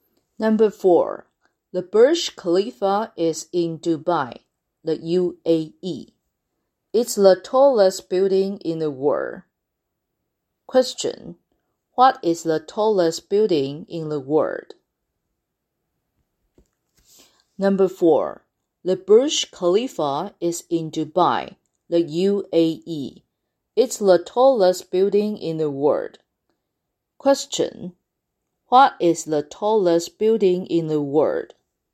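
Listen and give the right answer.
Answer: The Burj Khalifa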